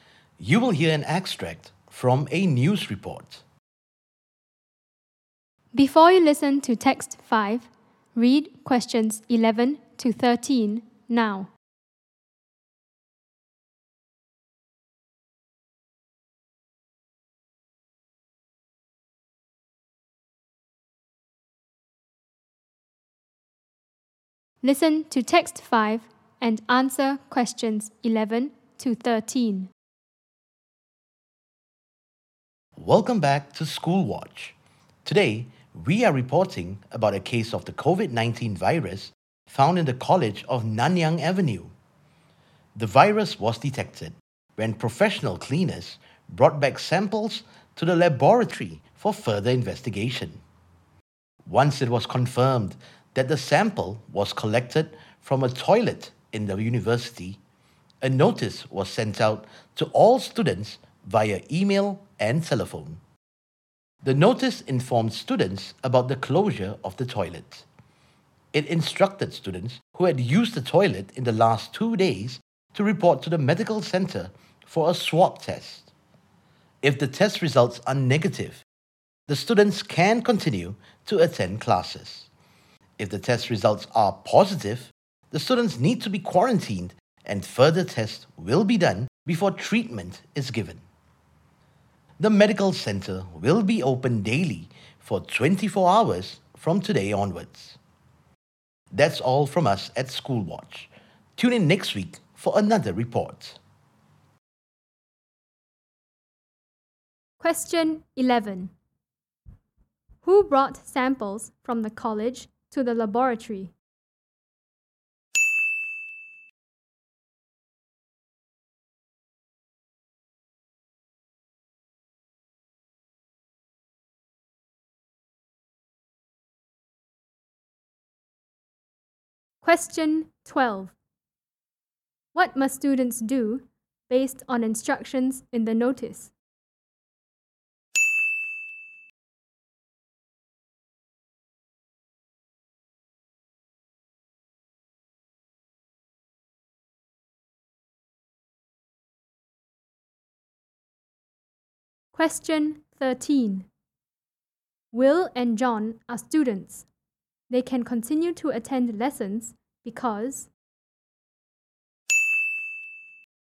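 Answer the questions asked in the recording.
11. Professional cleaners
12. Students who used the toilet in the last 2 days must report to the medical center for a swab test
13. their test results are negative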